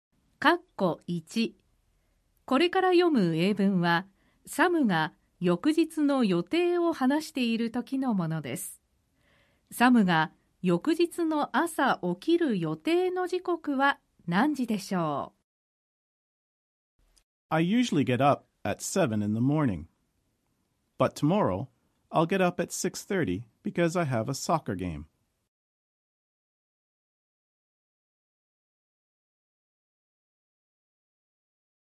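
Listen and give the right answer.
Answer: 6時30分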